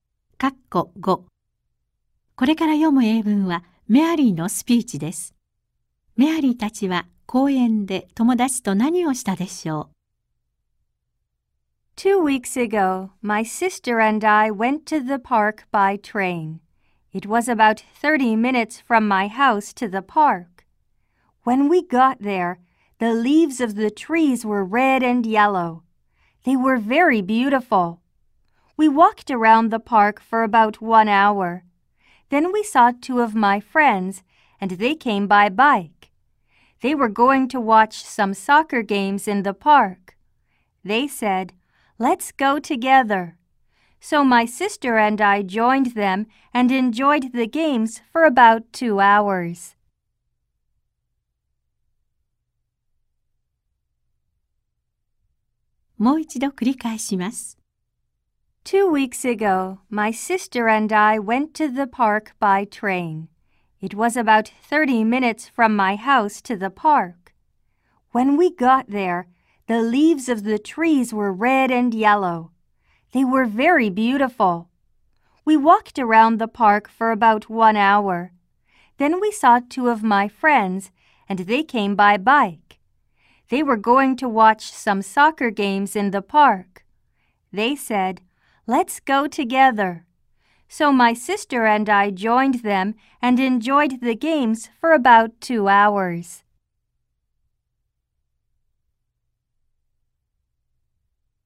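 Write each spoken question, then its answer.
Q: メアリーたちは公園で友達と何をしたでしょう。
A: サッカーの試合を見た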